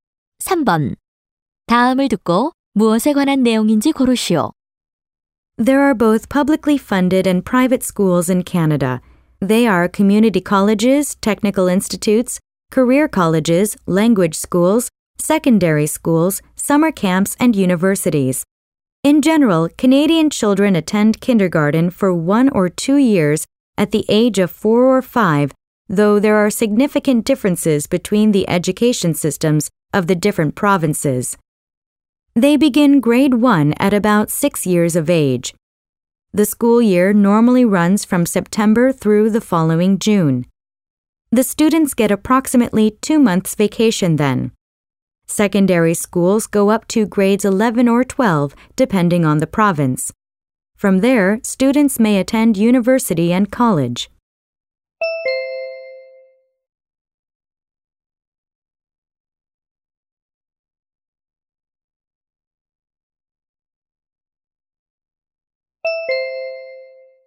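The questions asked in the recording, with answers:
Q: 다음을 듣고 무엇에 관한 내용인지 고르시오.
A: 캐나다의 교육 제도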